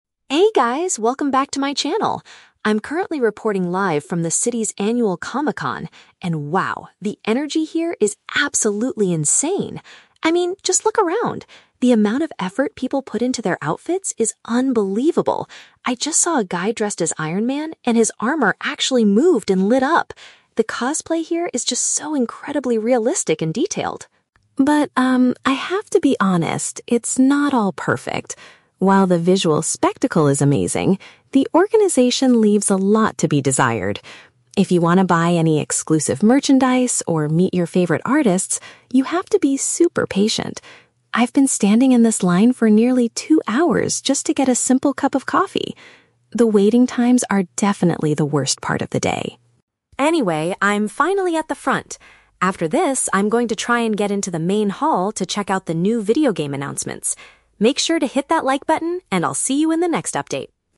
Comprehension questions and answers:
Listen to a vlogger talking about her experience at a comic convention and choose the correct answer (A, B, or C) for each question.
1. What does the vlogger find most impressive about the event?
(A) The opportunity to meet famous comic book artists in person.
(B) The high quality and lifelike appearance of the fans' costumes.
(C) The special effects used in the upcoming movie trailers.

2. What is the vlogger's main complaint about the festival?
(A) She has to spend an excessive amount of time standing in queues.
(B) The exclusive merchandise sold at the shops is far too expensive.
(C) The layout of the main hall is very confusing for visitors.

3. What does the speaker plan to do next?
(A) Take a photo with a person wearing an Iron Man suit.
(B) Buy some limited edition items to show her viewers.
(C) Head to a specific area to see some upcoming gaming news.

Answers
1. B
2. A
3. C

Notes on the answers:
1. The vlogger praises the "outfits" and says the "cosplay here is just so incredibly realistic and detailed." Option (B) uses paraphrasing ("lifelike appearance" = realistic, "fans' costumes" = outfits/cosplay). Option (A) is a trap; meeting artists is mentioned, but she complains about how hard it is to do. Option (C) is a plausible guess for Comic-Con, but movie trailers are not mentioned.
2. She complains that she has been "standing in this line for nearly two hours" and that the "waiting times are definitely the worst part." Option (A) accurately paraphrases this ("excessive amount of time" = nearly two hours, "standing in queues" = standing in this line). Option (B) is a trap; "exclusive merchandise" is mentioned, but she doesn't complain about the price, only the wait to get it. Option (C) is a trap; the "main hall" is mentioned at the end, but she doesn't say the layout is confusing.
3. The vlogger states, "I'm going to try and get into the main hall to check out the new video game announcements." Option (C) perfectly paraphrases this action ("specific area" = main hall, "upcoming gaming news" = new video game announcements). Option (A) is a trap; she already saw the Iron Man suit earlier. Option (B) is a trap; she mentions buying merchandise earlier, but that is not her next planned action.

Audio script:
Vlogger: Hey guys, welcome back to my channel! I'm currently reporting live from the city's annual Comic-Con, and wow, the energy here is absolutely insane. I mean, just look around! The amount of effort people put into their outfits is unbelievable. I just saw a guy dressed as Iron Man, and his armor actually moved and lit up. The cosplay here is just so incredibly realistic and detailed.
But, um, I have to be honest, it's not all perfect. While the visual spectacle is amazing, the organization leaves a lot to be desired. If you want to buy any exclusive merchandise or meet your favorite artists, you have to be super patient. I've been standing in this line for nearly two hours just to get a simple cup of coffee! The waiting times are definitely the worst part of the day.
Anyway, I'm finally at the front. After this, I'm going to try and get into the main hall to check out the new video game announcements. Make sure to hit that like button, and I'll see you in the next update!

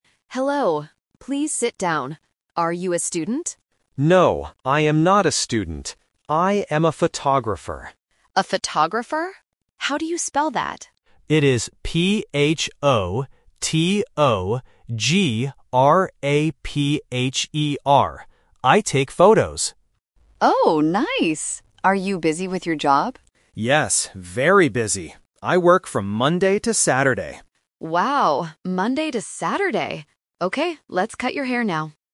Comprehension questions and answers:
Listen to the short conversation at a hair salon. Choose the correct answer (A, B, or C) for each question.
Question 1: What is the man's job?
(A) A student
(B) A photographer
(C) A hairdresser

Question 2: How do you spell the man's job?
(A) P-H-O-T-O-G-R-A-F-E-R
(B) P-H-O-T-O-G-R-A-P-E-R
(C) P-H-O-T-O-G-R-A-P-H-E-R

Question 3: What days does the man work?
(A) From Monday to Friday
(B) From Monday to Saturday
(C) Only on Sunday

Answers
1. B
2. C
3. B

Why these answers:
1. The man clearly states: "I am a photographer." Option (A) is a trap because the hairdresser asks "Are you a student?", but the man rejects it by saying "No". Option (C) is the woman's job, not the man's job.
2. The man spells his job very clearly: "P-H-O-T-O-G-R-A-P-H-E-R". Options (A) and (B) are spelling traps with missing letters or incorrect consonants that sound similar.
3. The man says: "I work from Monday to Saturday." Option (A) is a very common working schedule but it is not mentioned in the audio. Option (C) is not mentioned.

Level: A1

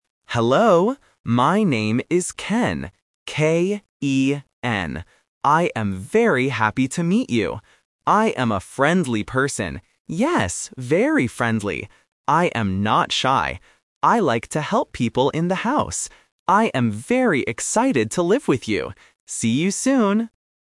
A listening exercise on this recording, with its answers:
Listen to the monologue and circle the correct answer for each question.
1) What is the student's name?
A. Ben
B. Ken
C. Kevin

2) How does the student describe himself?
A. Shy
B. Lazy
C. Friendly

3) How does he feel about meeting the host family?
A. Happy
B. Sad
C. Angry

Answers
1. B
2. C
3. A

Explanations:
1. The correct answer is (B). The student spells his name clearly: "K-E-N." Option (A) "Ben" is a sound trap because it rhymes with Ken. Option (C) "Kevin" is a trap using a common name starting with K.
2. The correct answer is (C). Ken says twice that he is a "friendly" person. Option (A) "Shy" is the trap; he explicitly says, "I am not shy." Option (B) "Lazy" is never mentioned in the audio.
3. The correct answer is (A). Ken clearly states, "I am very happy to meet you." Options (B) "Sad" and (C) "Angry" are negative emotions that are not mentioned in the monologue.

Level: A1

